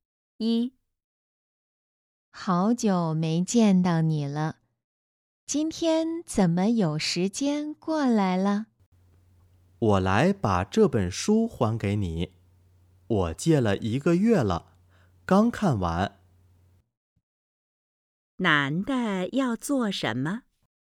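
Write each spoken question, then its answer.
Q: 男的要做什么?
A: 还书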